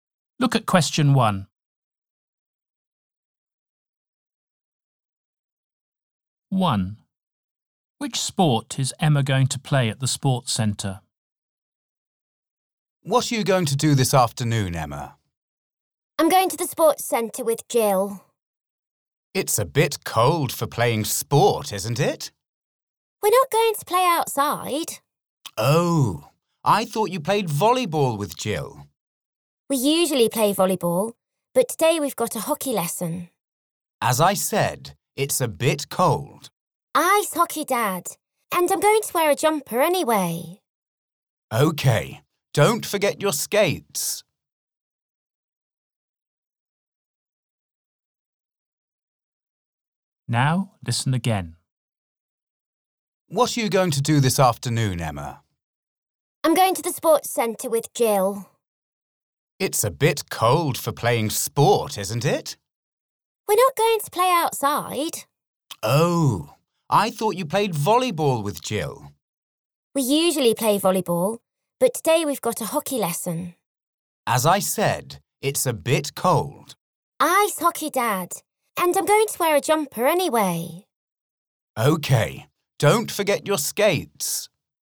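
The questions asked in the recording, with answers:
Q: Which sport is Emma going to play at the sports centre?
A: Ice hockey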